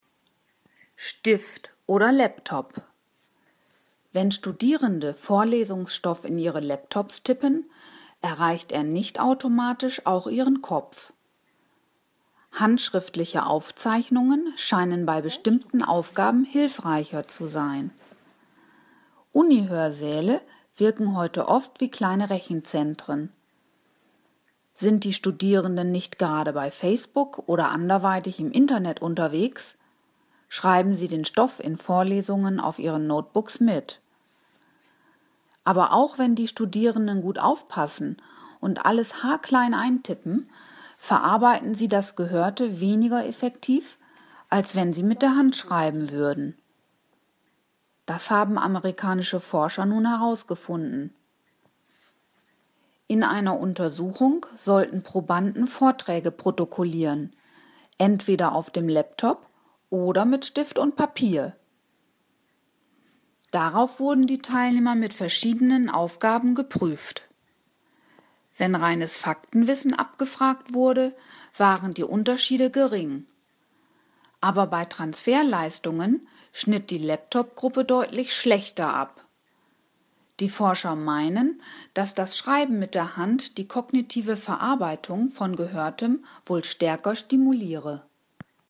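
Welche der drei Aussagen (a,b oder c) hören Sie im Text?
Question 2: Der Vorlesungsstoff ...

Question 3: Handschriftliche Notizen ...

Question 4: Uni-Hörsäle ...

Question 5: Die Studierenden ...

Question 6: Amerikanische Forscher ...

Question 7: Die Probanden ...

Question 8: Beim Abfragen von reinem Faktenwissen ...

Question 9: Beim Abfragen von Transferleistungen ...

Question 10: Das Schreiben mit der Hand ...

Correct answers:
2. erreicht nicht automatisch den Kopf, wenn er in den Laptop getippt wird
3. scheinen bei bestimmten Aufgaben hilfreicher zu sein
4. wirken heute oft wie kleine Rechenzentren
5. verarbeiten das Gehörte am Laptop weniger effektiv als mit der Hand
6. haben das herausgefunden
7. sollten Vorträge auf dem Laptop oder mit Stift und Papier protokollieren
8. waren die Unterschiede gering
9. schnitt die Laptop-Gruppe deutlich schlechter ab
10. stimuliert die kognitive Verarbeitung von Gehörtem wohl stärker

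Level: Hörtexte B (mittel)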